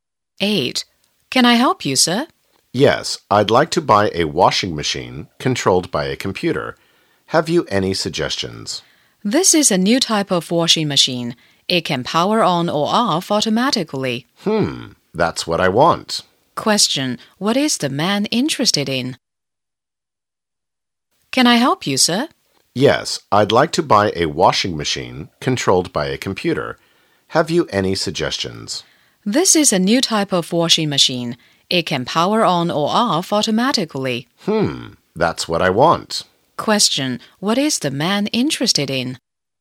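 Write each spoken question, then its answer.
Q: What is the man interested in?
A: A computer-controlled washing machine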